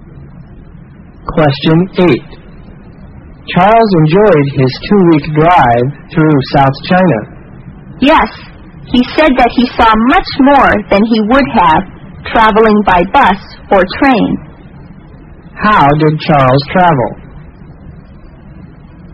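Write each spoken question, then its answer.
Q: How did Charles travel?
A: By car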